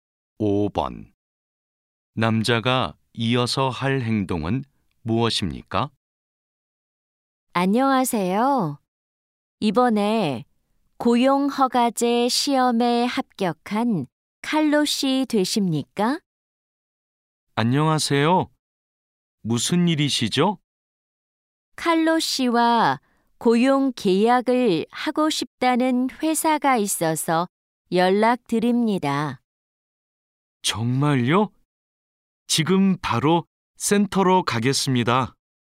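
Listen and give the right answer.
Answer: 센터로 간다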